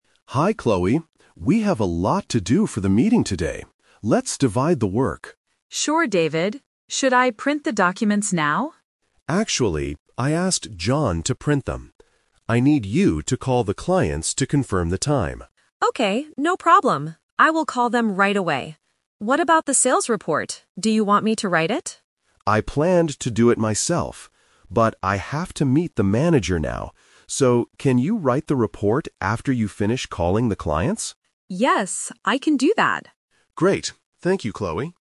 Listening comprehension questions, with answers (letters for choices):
Listen to the conversation between a team leader and a team member. Circle the correct answer (A, B, or C).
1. Who is going to print the documents?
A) Chloe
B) John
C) David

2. What is the first thing Chloe needs to do?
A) Call the clients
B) Meet the manager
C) Write the sales report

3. Why is David NOT writing the sales report?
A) He has to meet the manager.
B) He is printing the documents.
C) He does not know how to write it.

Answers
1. B
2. A
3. A

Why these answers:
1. David clearly states, "I asked John to print them." Option (A) is the trap because Chloe offers to do it first ("Should I print the documents now?"). Option (C) is incorrect because David is just delegating the task.
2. David tells Chloe, "I need you to call the clients..." and asks her to write the report "after you finish calling the clients." Option (B) is a trap because David is the one meeting the manager. Option (C) is a trap because she will write the report, but it is her second task, not the first.
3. David explains, "I planned to do it myself. But I have to meet the manager now." Option (B) is a trap using the printing task, which belongs to John. Option (C) is a plausible guess for someone not doing a task, but it is never mentioned in the audio.

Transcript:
David: Hi Chloe. We have a lot to do for the meeting today. Let's divide the work.
Chloe: Sure, David. Should I print the documents now?
David: Actually, I asked John to print them. I need you to call the clients to confirm the time.
Chloe: Okay, no problem. I will call them right away. What about the sales report? Do you want me to write it?
David: I planned to do it myself. But I have to meet the manager now. So, can you write the report after you finish calling the clients?